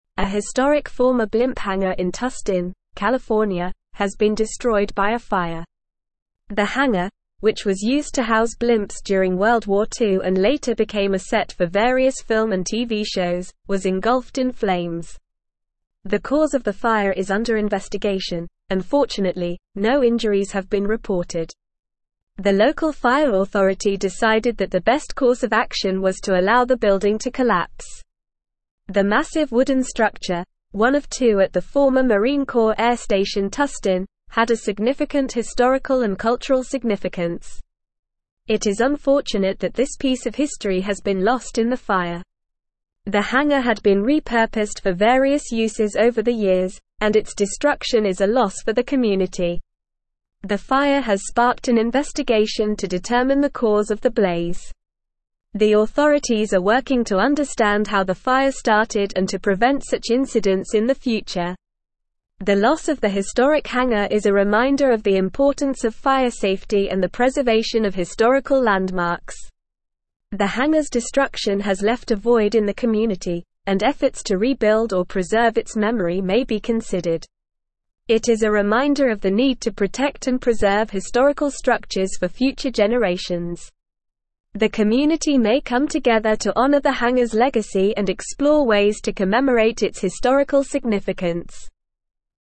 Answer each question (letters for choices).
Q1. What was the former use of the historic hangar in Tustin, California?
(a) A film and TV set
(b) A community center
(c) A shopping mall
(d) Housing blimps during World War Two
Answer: d

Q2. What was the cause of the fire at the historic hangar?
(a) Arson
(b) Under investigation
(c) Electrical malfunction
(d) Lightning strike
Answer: b

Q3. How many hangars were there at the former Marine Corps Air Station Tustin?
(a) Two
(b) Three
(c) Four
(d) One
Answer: a

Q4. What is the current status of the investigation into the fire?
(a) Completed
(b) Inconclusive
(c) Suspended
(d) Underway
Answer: d

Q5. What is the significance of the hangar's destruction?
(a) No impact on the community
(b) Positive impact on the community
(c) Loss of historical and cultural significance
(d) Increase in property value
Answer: c

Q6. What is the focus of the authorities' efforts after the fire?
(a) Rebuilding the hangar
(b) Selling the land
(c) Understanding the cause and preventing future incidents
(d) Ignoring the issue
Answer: c

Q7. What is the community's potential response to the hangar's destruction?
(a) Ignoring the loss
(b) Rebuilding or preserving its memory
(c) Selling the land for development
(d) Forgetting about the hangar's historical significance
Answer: b

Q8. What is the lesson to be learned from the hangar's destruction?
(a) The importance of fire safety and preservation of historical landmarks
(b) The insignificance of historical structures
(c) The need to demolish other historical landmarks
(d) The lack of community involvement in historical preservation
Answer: a

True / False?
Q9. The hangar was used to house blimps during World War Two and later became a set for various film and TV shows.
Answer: True

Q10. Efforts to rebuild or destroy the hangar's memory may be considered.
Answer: False

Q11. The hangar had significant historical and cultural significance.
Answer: True

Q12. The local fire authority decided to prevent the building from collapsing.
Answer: False

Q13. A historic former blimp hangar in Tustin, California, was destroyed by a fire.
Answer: True

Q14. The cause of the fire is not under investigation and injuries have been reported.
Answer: False

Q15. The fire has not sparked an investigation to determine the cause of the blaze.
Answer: False

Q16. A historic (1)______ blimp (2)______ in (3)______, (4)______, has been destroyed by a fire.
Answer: former

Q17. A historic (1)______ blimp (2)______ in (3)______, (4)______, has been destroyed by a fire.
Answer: hangar

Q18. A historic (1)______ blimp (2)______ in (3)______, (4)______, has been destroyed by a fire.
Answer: Tustin

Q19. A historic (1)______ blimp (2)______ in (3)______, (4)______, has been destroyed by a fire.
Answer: California

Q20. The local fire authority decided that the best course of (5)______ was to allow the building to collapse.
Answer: action

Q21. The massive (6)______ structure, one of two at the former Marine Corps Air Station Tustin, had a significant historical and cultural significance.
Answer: wooden

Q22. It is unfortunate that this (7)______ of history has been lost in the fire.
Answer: piece

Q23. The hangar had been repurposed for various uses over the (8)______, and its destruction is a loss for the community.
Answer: years

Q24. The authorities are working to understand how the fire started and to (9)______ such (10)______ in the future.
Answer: prevent

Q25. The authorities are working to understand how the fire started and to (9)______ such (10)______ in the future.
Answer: incidents

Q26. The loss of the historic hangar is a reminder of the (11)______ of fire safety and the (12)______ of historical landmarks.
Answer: importance

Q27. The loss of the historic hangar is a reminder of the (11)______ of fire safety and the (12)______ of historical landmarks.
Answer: preservation

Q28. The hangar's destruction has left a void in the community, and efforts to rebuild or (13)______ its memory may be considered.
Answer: preserve

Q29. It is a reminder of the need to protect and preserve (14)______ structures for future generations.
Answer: historical

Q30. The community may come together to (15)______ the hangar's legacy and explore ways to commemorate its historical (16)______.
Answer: honor

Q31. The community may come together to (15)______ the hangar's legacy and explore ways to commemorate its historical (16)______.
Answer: significance

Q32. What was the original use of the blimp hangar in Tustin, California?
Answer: The blimp hangar in Tustin, California, was originally used to house blimps during World War Two.

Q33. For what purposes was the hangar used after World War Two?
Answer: After World War Two, the hangar was repurposed and became a set for various film and TV shows.

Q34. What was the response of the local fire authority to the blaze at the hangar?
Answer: The local fire authority decided that the best course of action was to allow the building to collapse.

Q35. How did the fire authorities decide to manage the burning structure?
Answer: The fire authorities decided to let the building collapse as their course of action.

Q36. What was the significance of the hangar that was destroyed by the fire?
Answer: The hangar had significant historical and cultural significance, as it was a historic former blimp hangar from World War Two and had been used for various purposes over the years.

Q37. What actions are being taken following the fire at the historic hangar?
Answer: An investigation has been sparked to determine the cause of the fire and to understand how the fire started, with the aim of preventing such incidents in the future.

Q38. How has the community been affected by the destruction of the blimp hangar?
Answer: The community has been left with a void due to the loss of the historic hangar, which was a piece of history and had been repurposed for various uses over the years.

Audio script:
A historic former blimp hangar in Tustin, California, has been destroyed by a fire. The hangar, which was used to house blimps during World War Two and later became a set for various film and TV shows, was engulfed in flames. The cause of the fire is under investigation, and fortunately, no injuries have been reported. The local fire authority decided that the best course of action was to allow the building to collapse.
The massive wooden structure, one of two at the former Marine Corps Air Station Tustin, had a significant historical and cultural significance. It is unfortunate that this piece of history has been lost in the fire. The hangar had been repurposed for various uses over the years, and its destruction is a loss for the community.
The fire has sparked an investigation to determine the cause of the blaze. The authorities are working to understand how the fire started and to prevent such incidents in the future. The loss of the historic hangar is a reminder of the importance of fire safety and the preservation of historical landmarks.
The hangar's destruction has left a void in the community, and efforts to rebuild or preserve its memory may be considered. It is a reminder of the need to protect and preserve historical structures for future generations. The community may come together to honor the hangar's legacy and explore ways to commemorate its historical significance.

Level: Level 4